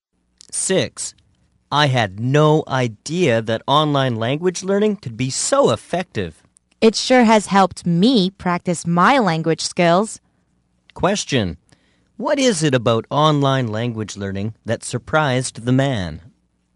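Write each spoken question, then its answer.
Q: What is it about online language learning that surprised the man?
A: How effective it is.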